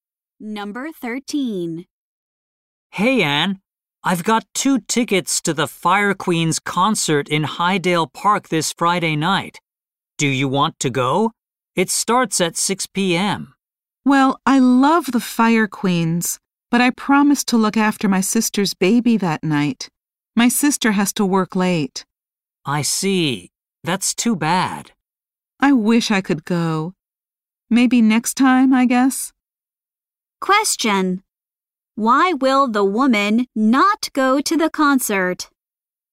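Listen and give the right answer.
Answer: She promised to look after her sister's baby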